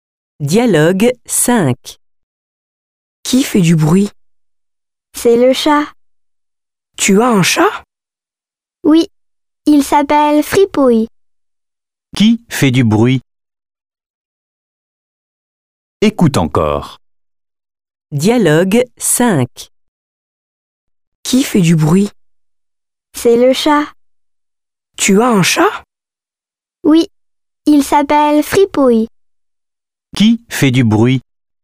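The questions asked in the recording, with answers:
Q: Qui fait du bruit?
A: Le chat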